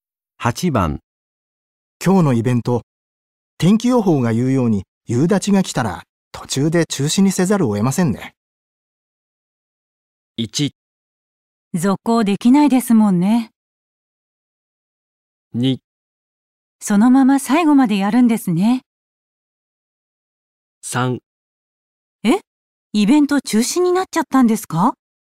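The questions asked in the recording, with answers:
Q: 今日のイベント、天気予報が言うように夕立が来たら途中で中止にせざるを得ませんね。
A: 1: 続行できないですもんね。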